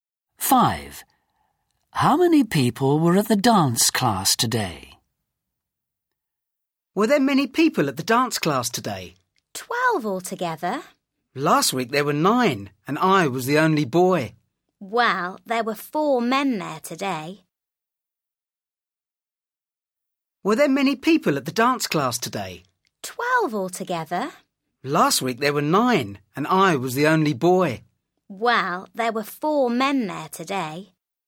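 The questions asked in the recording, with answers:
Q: How many people were at the dance class today?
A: 12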